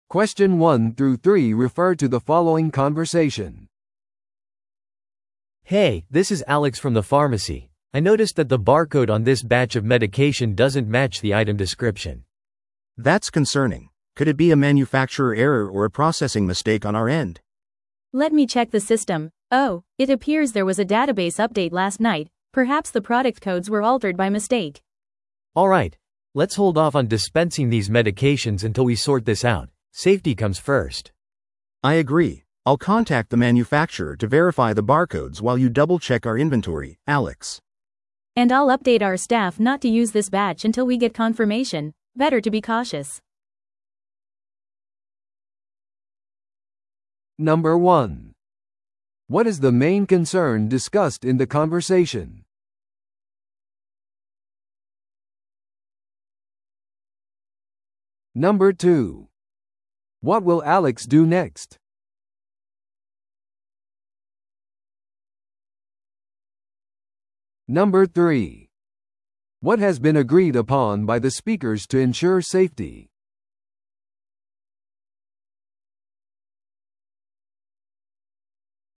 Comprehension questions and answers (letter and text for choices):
Listen to the audio below and answer the questions.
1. What is the main concern discussed in the conversation?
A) 間違った出荷が受け取られた。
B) 薬のバーコードにエラーがある。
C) スタッフがミスを犯した。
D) 薬局のシステムを更新する必要がある。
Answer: B) 薬のバーコードにエラーがある。

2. What will Alex do next?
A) さらなる薬のためにメーカーに連絡する。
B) さらなるエラーのために在庫をチェックする。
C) 待っている顧客に薬を調剤する。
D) すぐに薬局のデータベースを更新する。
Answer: B) さらなるエラーのために在庫をチェックする。

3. What has been agreed upon by the speakers to ensure safety?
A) データベースの更新を延期する。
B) 直ちに薬を配布する。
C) 問題のある薬のバッチを使用しない。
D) 通常通り薬を使い続ける。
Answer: C) 問題のある薬のバッチを使用しない。

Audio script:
A: Hey, this is Alex from the pharmacy. I noticed that the barcode on this batch of medication doesn't match the item description.
B: That's concerning. Could it be a manufacturer error or a processing mistake on our end?
C: Let me check the system. Oh, it appears there was a database update last night. Perhaps the product codes were altered by mistake.
A: Alright, let's hold off on dispensing these medications until we sort this out. Safety comes first.
B: I agree. I'll contact the manufacturer to verify the barcodes while you double-check our inventory, Alex.
C: And I'll update our staff not to use this batch until we get confirmation. Better to be cautious.